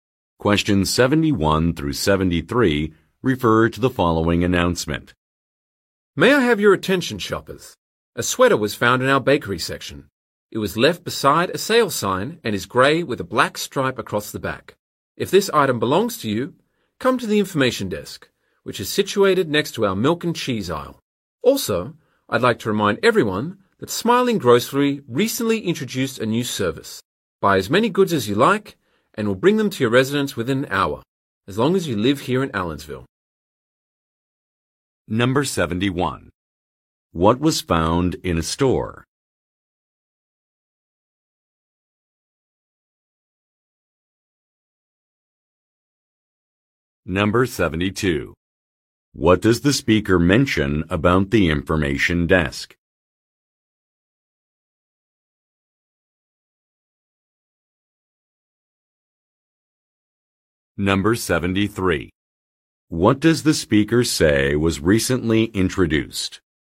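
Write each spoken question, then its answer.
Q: What was found in a store?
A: A sweater

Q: What does the speaker mention about the information desk?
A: It is next to the milk and cheese aisle

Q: What does the speaker say was recently introduced?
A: A delivery service that brings goods to homes in Allensville within an hour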